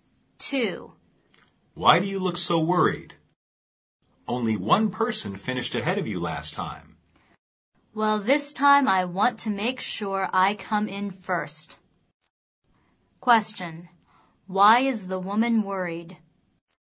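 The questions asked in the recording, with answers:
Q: Why is the woman worried?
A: She wants to make sure she comes in first this time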